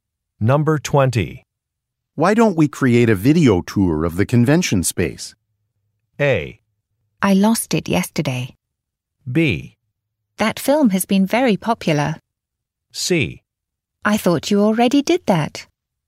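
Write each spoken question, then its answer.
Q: Why don't we create a video tour of the convention space?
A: C: I thought you already did that.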